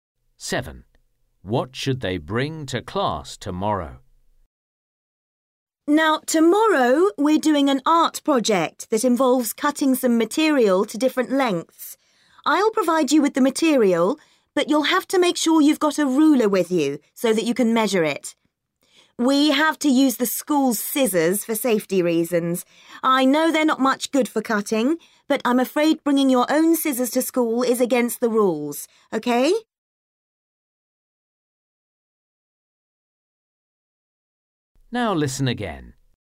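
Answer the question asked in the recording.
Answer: a ruler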